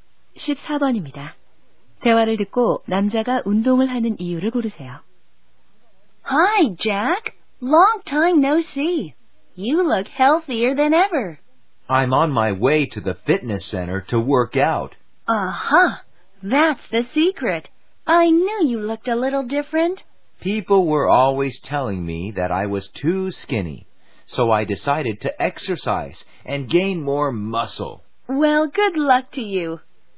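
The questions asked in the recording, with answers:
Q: 대화를 듣고 남자가 운동을 하는 이유를 고르세요.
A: 너무 말라서 근육을 키우려고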